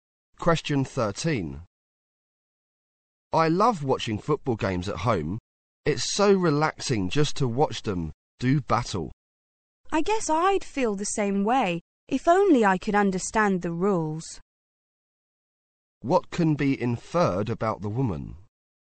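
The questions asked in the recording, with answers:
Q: What can be inferred about the woman?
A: She doesn't understand the rules of football.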